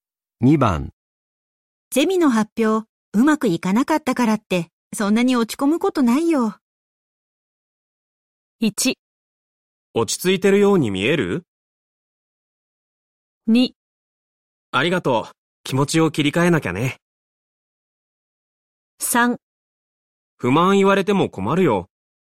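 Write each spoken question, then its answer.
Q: ゼミの発表、うまくいかなかったからって、そんなに落ち込むことないよ。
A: 2: ありがとう。気持ちを切り替えなきゃね。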